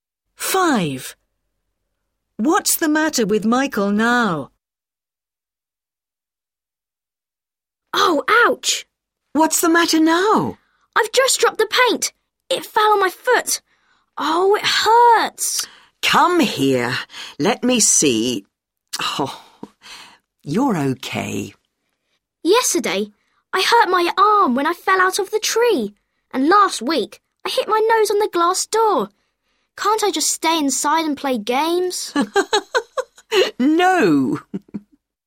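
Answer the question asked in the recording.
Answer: he hurt his foot (the paint fell on it)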